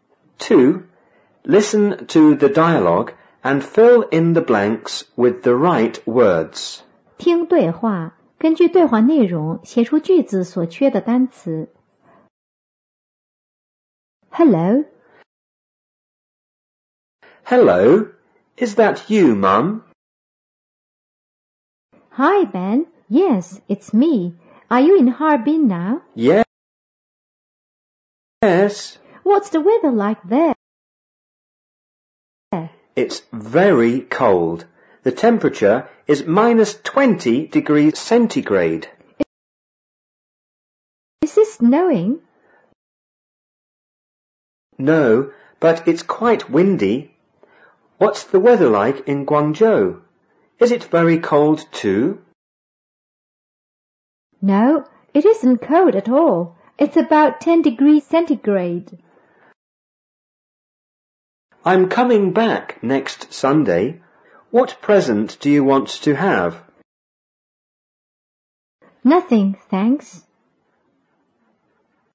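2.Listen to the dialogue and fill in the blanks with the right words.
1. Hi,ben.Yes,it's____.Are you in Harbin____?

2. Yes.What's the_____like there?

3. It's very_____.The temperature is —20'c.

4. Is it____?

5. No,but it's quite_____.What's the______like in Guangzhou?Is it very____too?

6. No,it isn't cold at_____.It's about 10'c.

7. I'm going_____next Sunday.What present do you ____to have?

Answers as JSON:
{"1": "me; now", "2": "weather", "3": "cold", "4": "snowing", "5": "windy; weather; cold", "6": "all", "7": "back; want"}

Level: 五年级下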